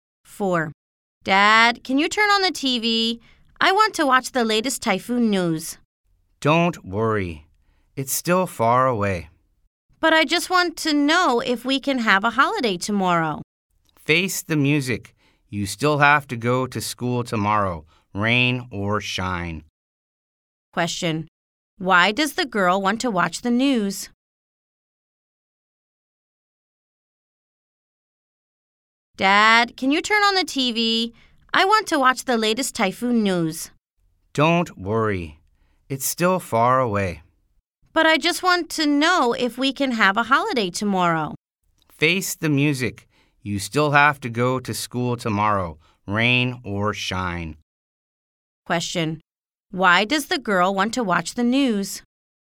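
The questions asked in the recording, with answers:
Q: Why does the girl want to watch the news?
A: She wants to know if they can have a holiday tomorrow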